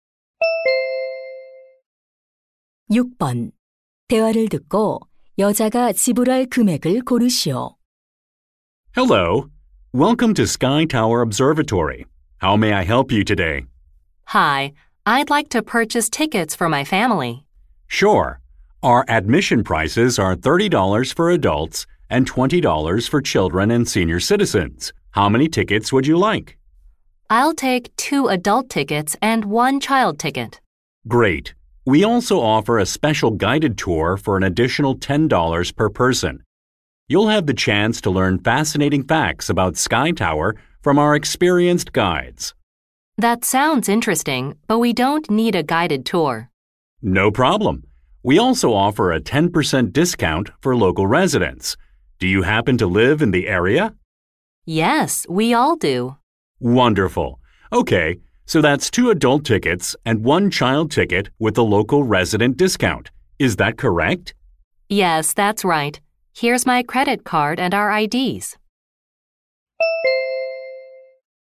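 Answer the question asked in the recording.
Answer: $72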